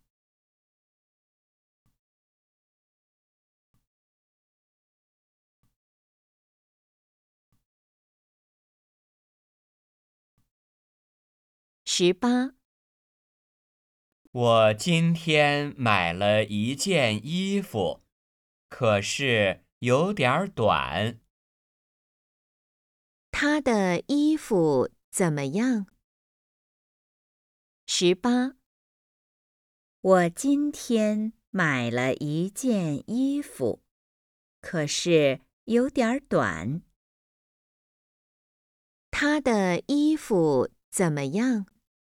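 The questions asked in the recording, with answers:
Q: 他的衣服怎么样?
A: 有点短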